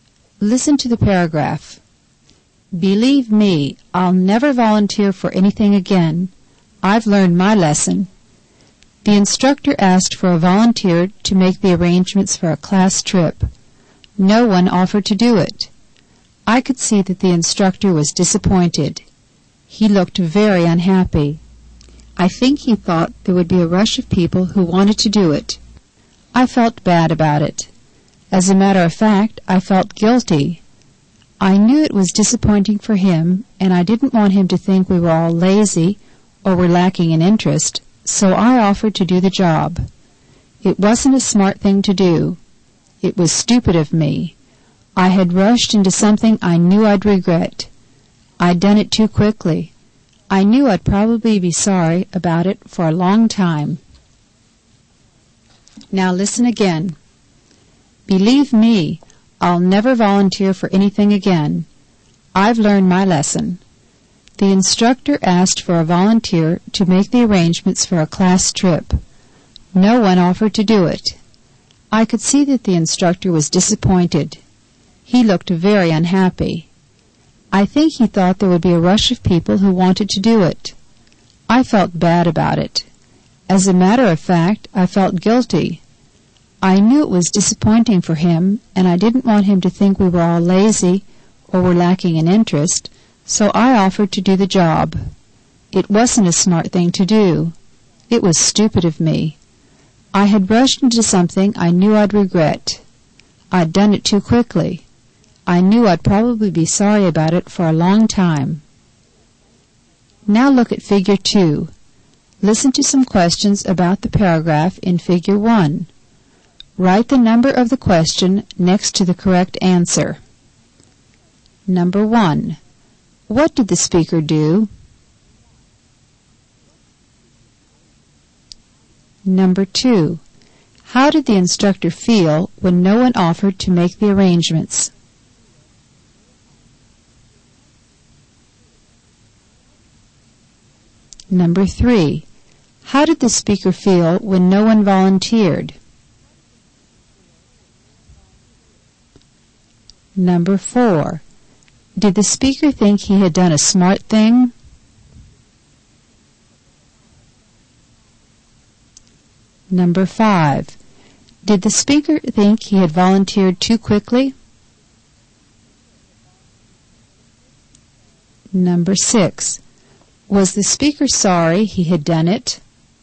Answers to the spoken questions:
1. He volunteered to make the arrangements for a class trip.
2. He felt disappointed.
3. He felt guilty.
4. No, he thought it was a stupid thing to do.
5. Yes, he thought he had rushed into it.
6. Yes, he regretted it.